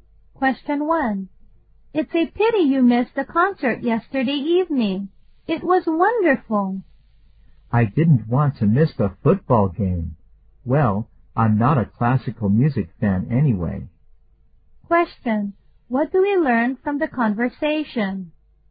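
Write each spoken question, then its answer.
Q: What do we learn from the conversation?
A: The man went to the football game instead of the concert because he doesn't like classical music.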